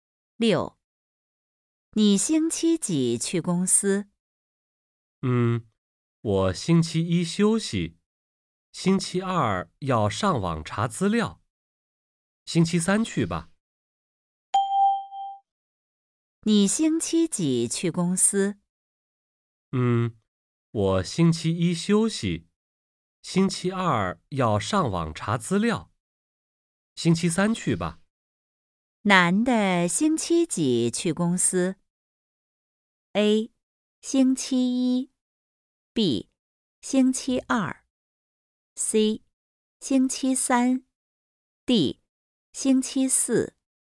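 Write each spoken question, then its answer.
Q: 男的星期几去公司?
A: C: 星期三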